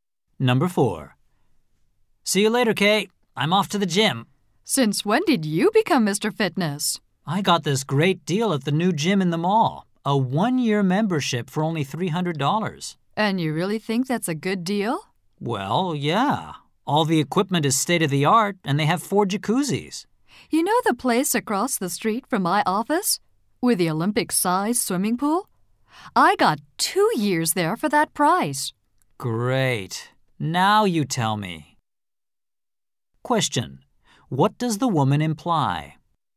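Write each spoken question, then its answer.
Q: What does the woman imply?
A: He could have got a better gym deal near her office.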